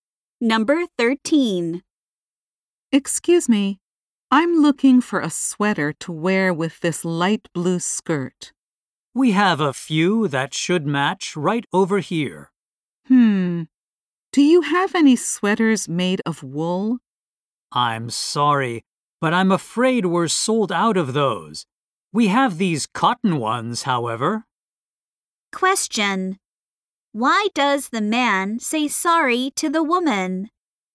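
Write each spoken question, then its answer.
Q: Why does the man say sorry to the woman?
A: The wool sweaters are sold out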